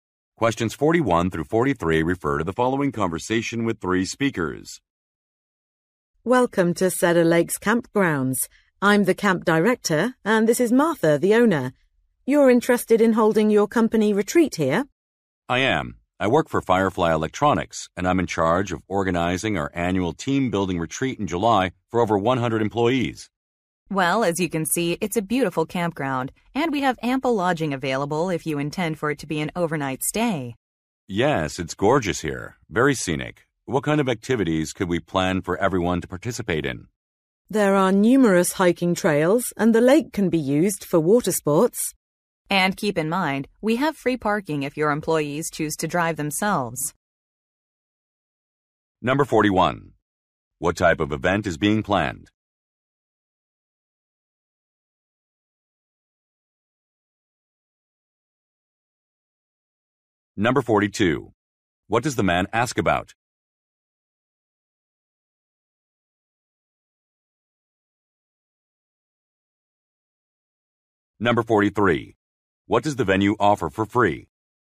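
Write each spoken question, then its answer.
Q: What type of event is being planned?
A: A company team-building retreat

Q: What does the man ask about?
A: Activities everyone can take part in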